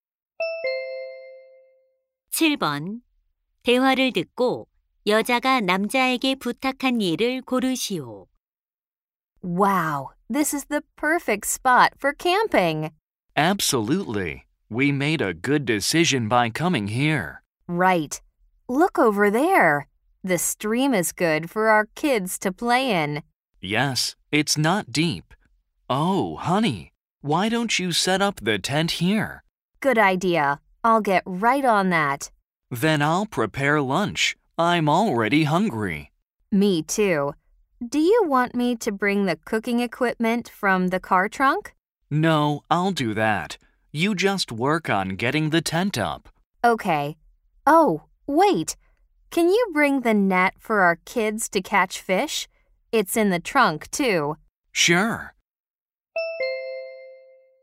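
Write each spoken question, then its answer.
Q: 대화를 듣고 여자가 남자에게 부탁한 일을 고르시오.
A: 아이들이 물고기 잡을 그물 가져오기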